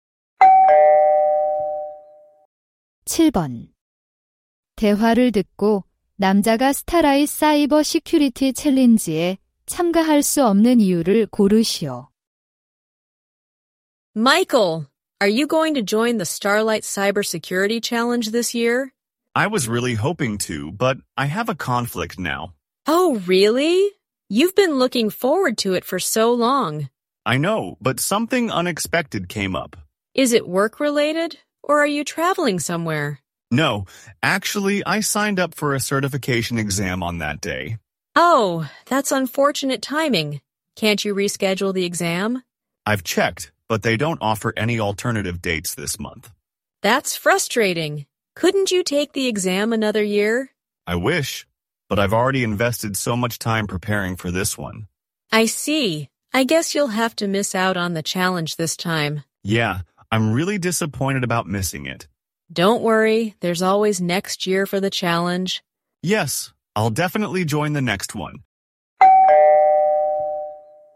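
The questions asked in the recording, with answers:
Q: 대화를 듣고 남자가 스타라이 사이버 시큐리티 챌린지에 참가할 수 없는 이유를 고르시오.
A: 같은 날 자격증 시험에 등록해서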